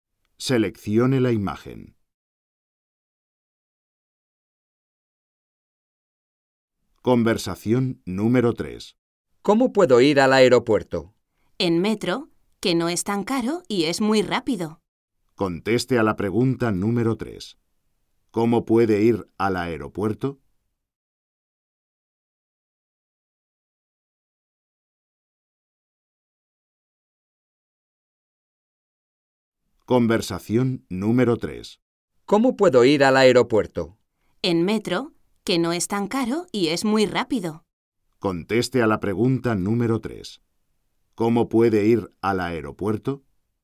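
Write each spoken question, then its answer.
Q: ¿Cómo puede ir al aeropuerto?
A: En metro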